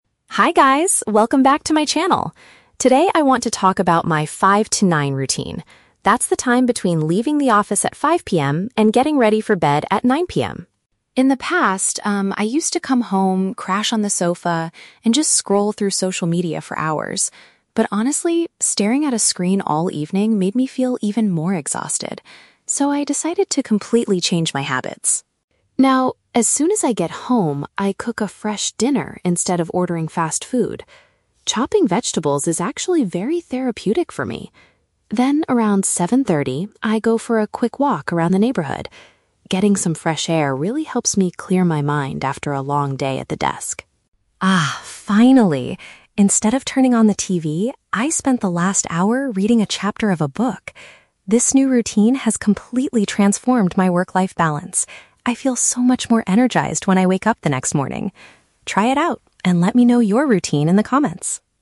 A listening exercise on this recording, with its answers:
Listen to a lifestyle vlogger talking about her evening routine and choose the correct answer (A, B, or C).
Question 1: Why did the vlogger decide to change her old evening habits?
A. Because she wanted to save money by not ordering fast food.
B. Because looking at the internet for hours made her feel very tired.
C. Because her manager advised her to stop using her phone at night.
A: B. Because looking at the internet for hours made her feel very tired.

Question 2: What does the vlogger do to relax her brain after working at a desk?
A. She takes a short walk outside in her local area.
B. She spends an hour watching her favorite TV shows.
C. She writes a new chapter for an interesting book.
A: A. She takes a short walk outside in her local area.

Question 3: What is the main benefit of this new routine for the vlogger?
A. She falls asleep much faster on her living room sofa.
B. She receives a lot of positive comments from her followers.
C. She feels more active and prepared the following day.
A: C. She feels more active and prepared the following day.

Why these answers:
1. The vlogger says she used to "scroll through social media for hours" and that it "made me feel even more exhausted." "Looking at the internet" is a paraphrase of scrolling through social media, and "tired" is a synonym for exhausted. Trap Analysis: Option (A) is a trap. The script mentions "ordering fast food," but that is what she stopped doing as part of her new routine, not the main reason she decided to change her lifestyle. Option (C) is plausible but is never mentioned.
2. She mentions that she goes for a "quick walk around the neighborhood" to help "clear my mind after a long day at the desk." "Local area" is a paraphrase of the neighborhood. Trap Analysis: Option (B) is a trap. The audio mentions the "TV", but she says she reads a book "instead of turning on the TV." Option (C) is a trap because the script mentions a "chapter of a book," but she reads it, she doesn't write it.
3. At the end, the vlogger says, "I feel so much more energized when I wake up the next morning." "Active and prepared the following day" is a paraphrase of feeling energized the next morning. Trap Analysis: Option (A) is a trap. The "sofa" is mentioned as the place where she used to crash in the past, not a benefit of her new routine. Option (B) is a trap because she asks for "comments" at the end, but she doesn't say that getting comments is the benefit of the routine.

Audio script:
Vlogger: Hi guys, welcome back to my channel! Today, I want to talk about my "5-to-9" routine. That's the time between leaving the office at 5 PM and getting ready for bed at 9 PM.
In the past, um, I used to come home, crash on the sofa, and just scroll through social media for hours. But honestly, staring at a screen all evening made me feel even more exhausted. So, I decided to completely change my habits.
Now, as soon as I get home, I cook a fresh dinner instead of ordering fast food. Chopping vegetables is actually very therapeutic for me. Then, around 7:30, I go for a quick walk around the neighborhood. Getting some fresh air really helps me clear my mind after a long day at the desk.
Ah, finally, instead of turning on the TV, I spend the last hour reading a chapter of a book. This new routine has completely transformed my work-life balance. I feel so much more energized when I wake up the next morning. Try it out, and let me know your routine in the comments!

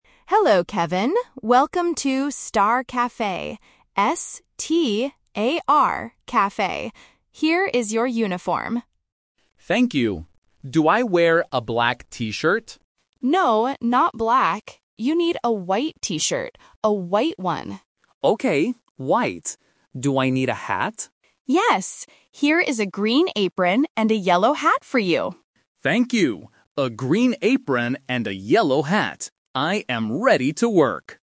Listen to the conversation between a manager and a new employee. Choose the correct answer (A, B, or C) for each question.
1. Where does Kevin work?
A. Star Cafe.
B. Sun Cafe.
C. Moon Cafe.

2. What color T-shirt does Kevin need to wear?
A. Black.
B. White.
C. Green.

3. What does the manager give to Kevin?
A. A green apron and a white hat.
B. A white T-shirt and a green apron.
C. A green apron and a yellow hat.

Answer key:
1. A. Star Cafe.
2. B. White.
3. C. A green apron and a yellow hat.

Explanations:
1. The manager clearly says, "Welcome to Star Cafe," and spells it out: "S-T-A-R Cafe." Options B and C are not mentioned in the audio.
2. The manager says, "You need a white T-shirt" and repeats "A white one." Option A (Black) is the trap because Kevin asks if he should wear black, but the manager says "No." Option C (Green) is the color of the apron.
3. The manager explicitly says, "Here is a green apron and a yellow hat for you." Option A is a trap that mixes up the hat's color with the T-shirt's color (white). Option B is a trap because the manager does not give him a T-shirt; she only tells him what color to wear.

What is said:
Manager: Hello, Kevin. Welcome to "Star Cafe". Here is your uniform.
Kevin: Thank you. Do I wear a black T-shirt?
Manager: No, not black. You need a white T-shirt. A white one.
Kevin: Okay, white. Do I need a hat?
Manager: Yes. Here is a green apron and a yellow hat for you.
Kevin: Thank you! A green apron and a yellow hat. I am ready to work.

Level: A1

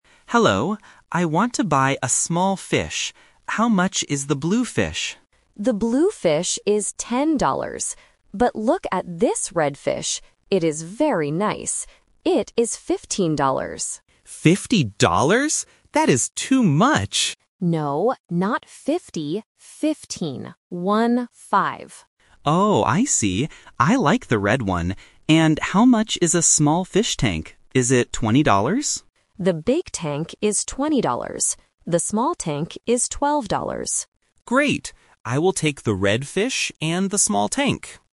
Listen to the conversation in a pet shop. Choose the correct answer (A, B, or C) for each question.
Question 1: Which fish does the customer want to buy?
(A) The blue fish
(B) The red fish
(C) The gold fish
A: (B) The red fish

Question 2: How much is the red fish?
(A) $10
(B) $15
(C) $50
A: (B) $15

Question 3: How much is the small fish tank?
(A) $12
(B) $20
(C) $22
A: (A) $12

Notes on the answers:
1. The customer asks about the blue fish first, but then says, "I like the red one" and decides to take it. Option A (The blue fish) is the trap because it is mentioned at the beginning. Option C (The gold fish) is not mentioned.
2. The owner clearly says the red fish is "fifteen. One, five." Option C ($50) is the trap because the customer hears it wrong and asks, "Fifty dollars?". Option A ($10) is the price of the blue fish.
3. The owner says, "The small tank is twelve dollars." Option B ($20) is a trap because the customer guesses that price, and it is the price for the big tank, not the small one. Option C ($22) is not mentioned.

